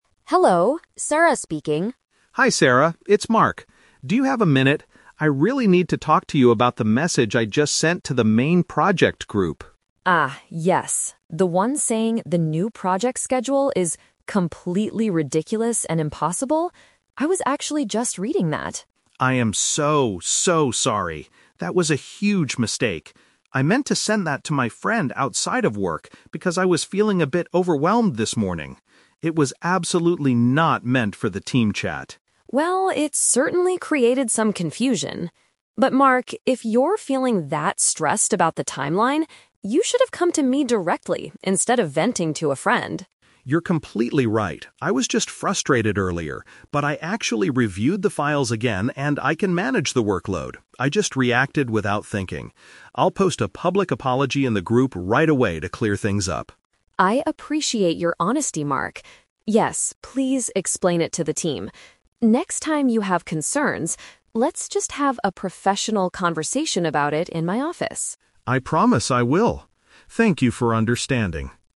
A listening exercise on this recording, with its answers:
Listen to a phone conversation between an employee and his manager. Choose the best answer (A, B, or C) for each question.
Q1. Why is Mark calling his manager?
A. To complain about his impossible workload.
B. To apologize for delivering a text to the wrong place.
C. To ask for a few days off to reduce his stress.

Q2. What is Sarah's main advice to Mark?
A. He should communicate work problems to her rather than outsiders.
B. He should delete the negative message from the group immediately.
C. He needs to ask his coworkers for help with the new schedule.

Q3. What does Mark promise to do next?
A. Have a private meeting with the rest of the team members.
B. Call his friend to explain the misunderstanding.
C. Write a message to say sorry to the company staff.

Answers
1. B
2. A
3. C

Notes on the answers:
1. Mark is calling to say "I am so, so sorry" because he sent a message to the team chat but "meant to send that to my friend." Paraphrasing: send to the wrong place = delivering a text to the wrong place. Trap: Option A is a trap. The content of the message was a complaint, but the reason for his phone call is to apologize for sending it. Option C is plausible for a stressed employee but is not mentioned in the audio.
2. Sarah tells Mark that he "should have come to me directly instead of venting to a friend." Paraphrasing: come to me directly = communicate work problems to her; friend = outsiders. Trap: Option B is a distractor. Mark says he will post a public apology, but Sarah never tells him to delete the original message. Option C is not mentioned; Mark actually says he can manage the workload now.
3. Mark says, "I'll post a public apology in the group right away." Paraphrasing: post a public apology = write a message to say sorry; the group = the company staff. Trap: Option A is a trap. He is posting a "public apology" in the group chat, not having a "private meeting." Option B is a distractor because his friend was the intended recipient of the original text, but he doesn't need to call them to fix this specific work problem.

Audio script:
Sarah: Hello, Sarah speaking.
Mark: Hi Sarah, it's Mark. Do you have a minute? I really need to talk to you about the message I just sent to the main project group.
Sarah: Ah, yes. The one saying the new project schedule is "completely ridiculous and impossible"? I was actually just reading that.
Mark: I am so, so sorry. That was a huge mistake. I meant to send that to my friend outside of work because I was feeling a bit overwhelmed this morning. It was absolutely not meant for the team chat.
Sarah: Well, it certainly created some confusion. But Mark, if you're feeling that stressed about the timeline, you should have come to me directly instead of venting to a friend.
Mark: You're completely right. I was just frustrated earlier, but I actually reviewed the files again, and I can manage the workload. I just reacted without thinking. I'll post a public apology in the group right away to clear things up.
Sarah: I appreciate your honesty, Mark. Yes, please explain it to the team. Next time you have concerns, let's just have a professional conversation about it in my office.
Mark: I promise I will. Thank you for understanding.

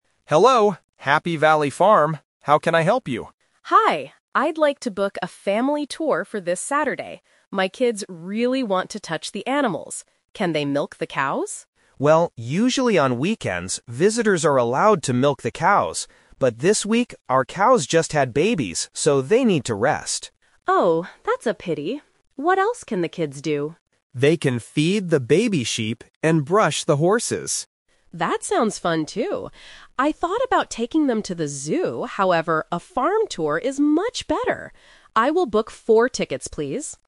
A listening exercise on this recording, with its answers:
Listen to the conversation between a customer and a call center agent, and choose the correct answer (A, B, or C).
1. What did the children want to do at the farm?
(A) Feed the baby sheep.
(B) Milk the cows.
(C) Ride the horses.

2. Why can't the children milk the cows this Saturday?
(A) Because the cows are very sick.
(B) Because the farm doesn't have any cows.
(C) Because the cows need to rest.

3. What does the customer decide to do at the end?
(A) She decides to book the farm tour tickets.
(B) She decides to take her kids to the zoo.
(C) She decides to call a different farm.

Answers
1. B
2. C
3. A

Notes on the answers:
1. The customer clearly asks, "Can they milk the cows?". Option (A) is the trap; feeding the baby sheep is the alternative activity they will do later. Option (C) is a distractor; the agent mentions they can brush the horses, not ride them.
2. The agent explains that the cows "just had babies, so they need to rest." Option (A) is a plausible reason in real life, but it is not mentioned. Option (B) is incorrect.
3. The customer says, "I will book four tickets, please." Option (B) is the trap; she says she thought about taking them to the zoo, but changed her mind because the farm tour is better (The Twist). Option (C) is not mentioned.

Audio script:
Agent: Hello, Happy Valley Farm. How can I help you?
Customer: Hi, I'd like to book a family tour for this Saturday. My kids really want to touch the animals. Can they milk the cows?
Agent: Well, usually on weekends, visitors are allowed to milk the cows. But this week, our cows just had babies, so they need to rest.
Customer: Oh, that's a pity. What else can the kids do?
Agent: They can feed the baby sheep and brush the horses.
Customer: That sounds fun too!

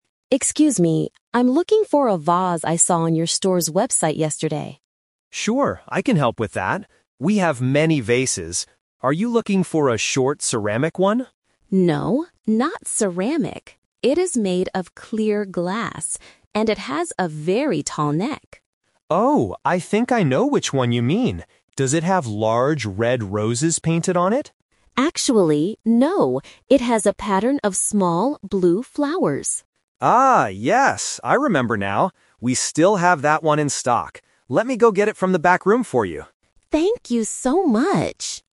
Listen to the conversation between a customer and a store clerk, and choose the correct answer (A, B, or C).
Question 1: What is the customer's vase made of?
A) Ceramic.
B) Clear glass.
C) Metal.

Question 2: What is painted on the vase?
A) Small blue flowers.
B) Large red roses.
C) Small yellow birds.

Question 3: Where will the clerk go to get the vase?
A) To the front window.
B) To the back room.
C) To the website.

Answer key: 1B, 2A, 3B

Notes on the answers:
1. The customer clearly states, "It is made of clear glass."
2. The customer corrects the clerk by saying, "Actually, no. It has a pattern of small blue flowers."
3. At the end of the conversation, the clerk says, "Let me go get it from the back room for you."

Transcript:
Customer: Excuse me. I'm looking for a vase I saw on your store's website yesterday.
Clerk: Sure, I can help with that. We have many vases. Are you looking for a short ceramic one?
Customer: No, not ceramic. It is made of clear glass. And it has a very tall neck.
Clerk: Oh, I think I know which one you mean. Does it have large red roses painted on it?
Customer: Actually, no. It has a pattern of small blue flowers.
Clerk: Ah, yes! I remember now. We still have that one in stock. Let me go get it from the back room for you.

